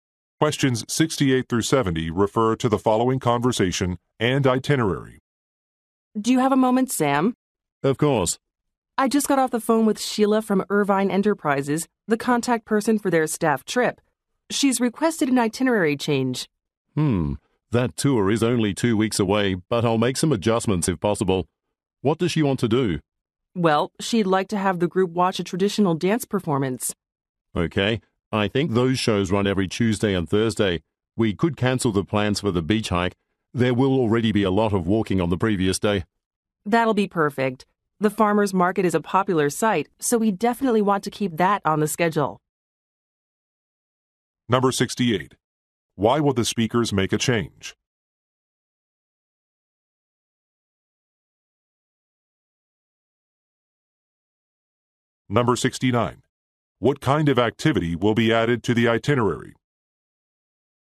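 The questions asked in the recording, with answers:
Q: Why will the speakers make a change?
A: A client requested an itinerary change

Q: What kind of activity will be added to the itinerary?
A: A traditional dance performance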